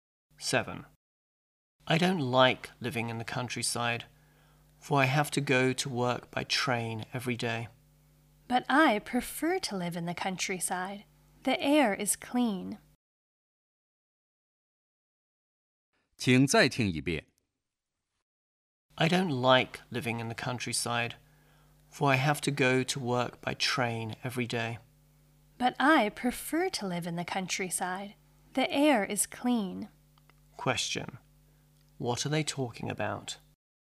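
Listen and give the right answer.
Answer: Living in the countryside.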